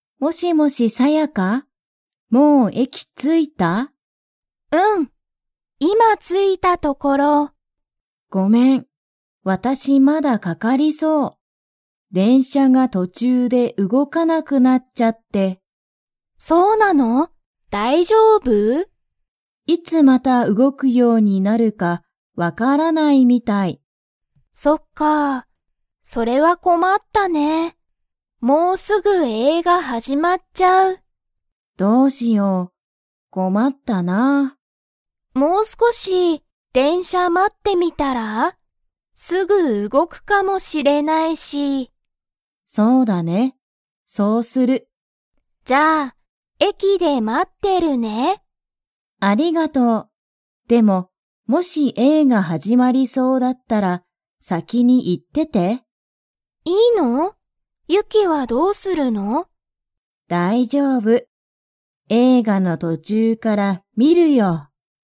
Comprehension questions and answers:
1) ユキの電車でんしゃは、 。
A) 動うごいている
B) 動うごいていない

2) もうすぐ、何なにが始はじまりますか?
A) 映画えいが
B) 電車でんしゃ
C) テレビ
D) 途中とちゅう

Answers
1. B
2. A

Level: Level 3

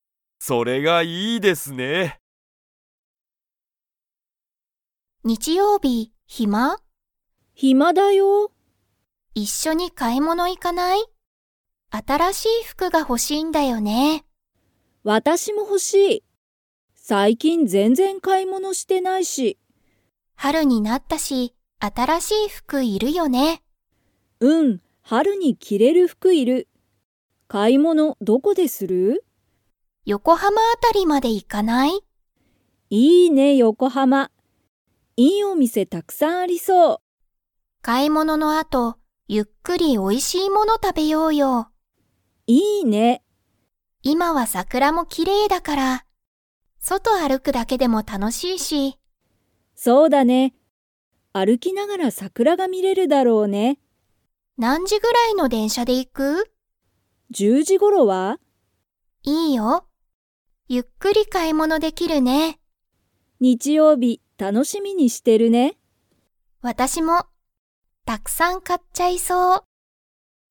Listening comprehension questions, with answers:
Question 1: 日曜日にちようび、まみとゆかは に行いく。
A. 東京とうきょう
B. 京都きょうと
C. 大阪おおさか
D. 横浜よこはま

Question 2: まみとゆかは、バスで買かい物ものに行いきますか?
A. はい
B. いいえ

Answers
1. D
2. B

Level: Level 4

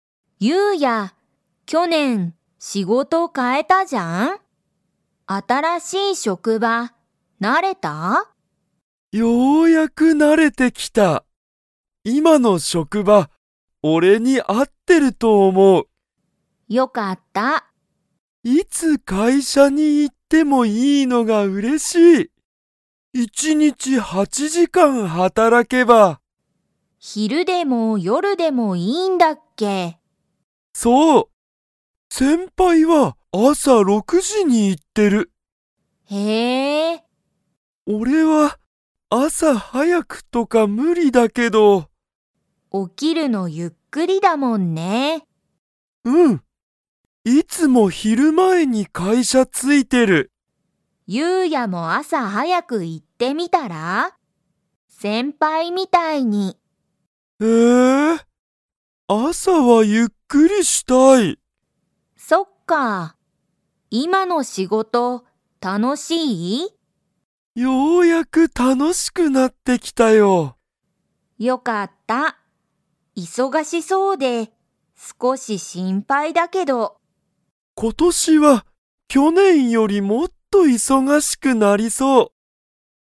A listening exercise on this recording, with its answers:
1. ユウヤの先輩せんぱいは朝あさ何時なんじに会社かいしゃ行いっていますか?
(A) 6ろく時じ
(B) 8はち時じ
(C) 10じゅう時じ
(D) 12じゅうに時じ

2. 今年ことし、ユウヤは去年きょねんより 。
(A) 忙いそがしくなりそう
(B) 忙いそがしくならなそう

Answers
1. A
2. A

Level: Level 4

